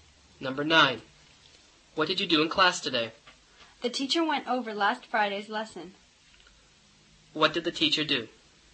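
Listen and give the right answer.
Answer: Reviewed last Friday's lesson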